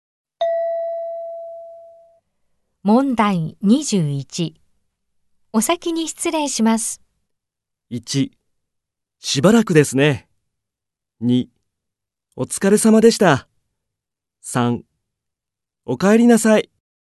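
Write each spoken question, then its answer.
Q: お先に失礼します。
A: 2: お疲れ様でした。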